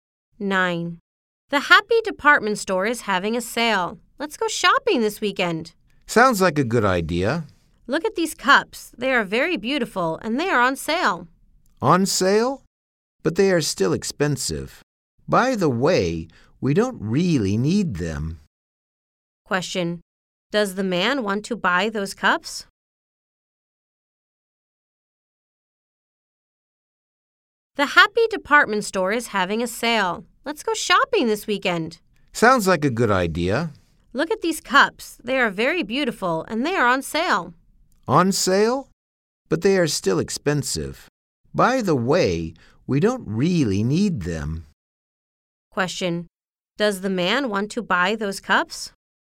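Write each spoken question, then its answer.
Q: Does the man want to buy those cups?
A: No, he doesn't.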